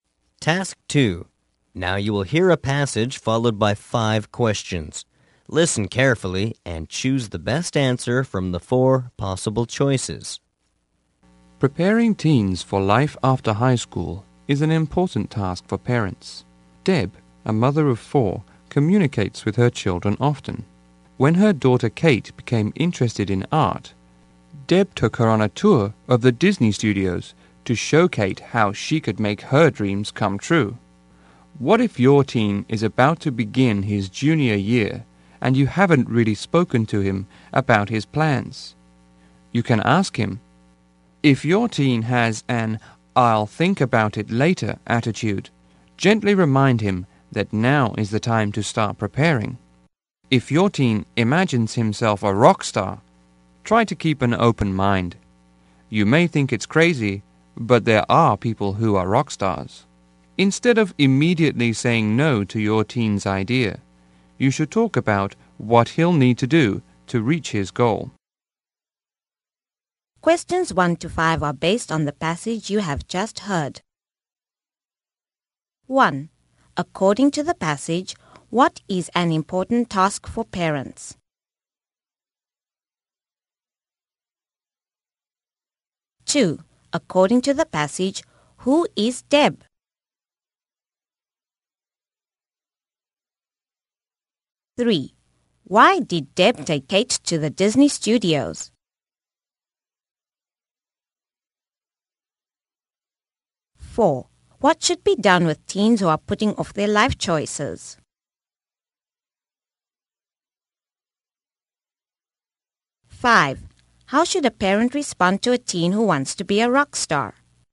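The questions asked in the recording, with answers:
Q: According to the passage, what is an important task for parents?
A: Preparing teens for life after high school.

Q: According to the passage, who is Deb?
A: A mother of four.

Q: Why did Deb take Kate to the Disney studios?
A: To show her how she could make her dreams in art come true.

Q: What should be done with teens who are putting off their life choices?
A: Gently remind them that now is the time to start preparing.

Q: How should a parent respond to a teen who wants to be a rock star?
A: Keep an open mind and talk about what he'll need to do to reach his goal.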